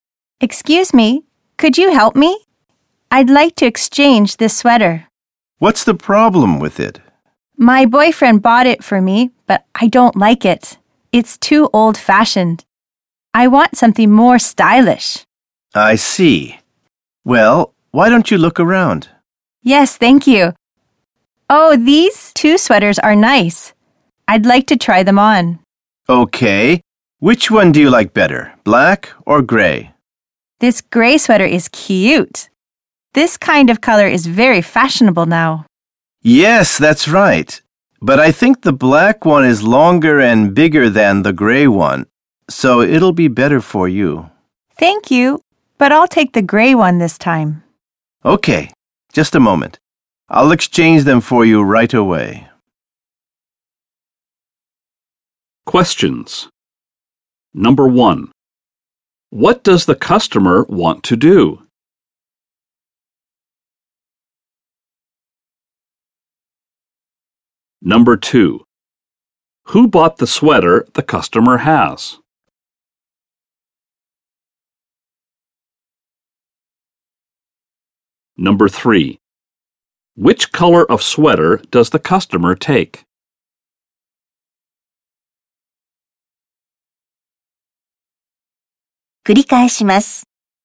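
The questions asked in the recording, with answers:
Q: What does the customer want to do?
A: Exchange a sweater

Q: Who bought the sweater the customer has?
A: Her boyfriend

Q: Which color of sweater does the customer take?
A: Gray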